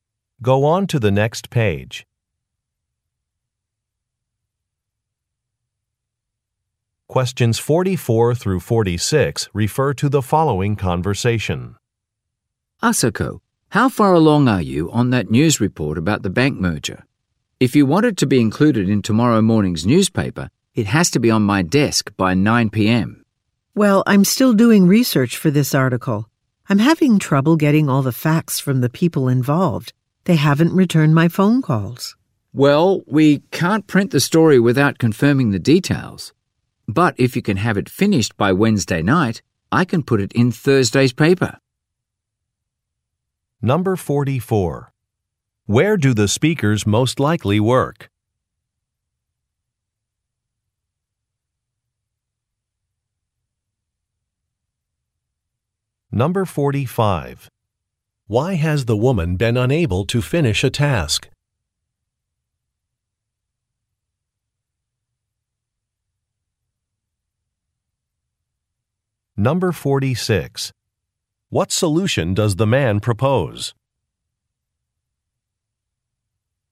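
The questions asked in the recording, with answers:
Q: Where do the speakers most likely work?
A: At a newspaper

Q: Why has the woman been unable to finish a task?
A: People involved haven't returned her calls

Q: What solution does the man propose?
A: Finish by Wednesday night for Thursday's paper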